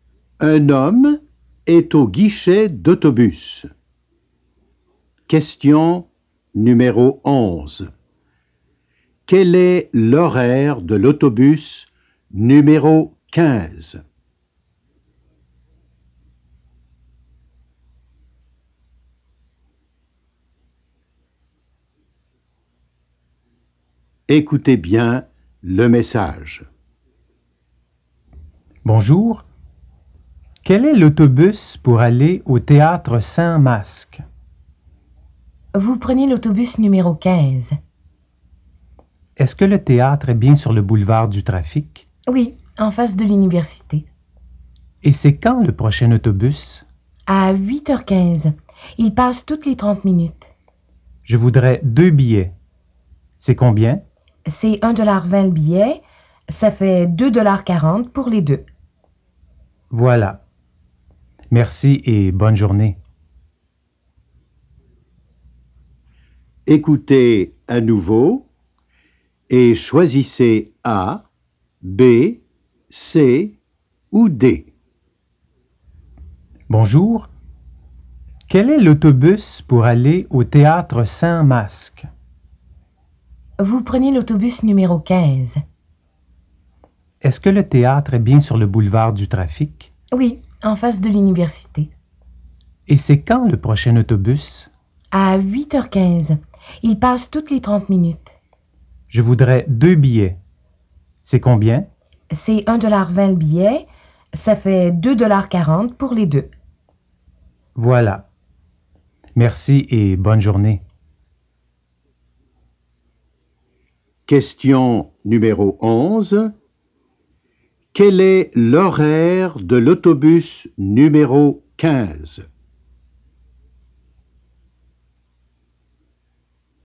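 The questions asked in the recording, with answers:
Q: Quel est l'horaire de l'autobus numéro 15?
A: Le prochain est à 8h15, puis toutes les 30 minutes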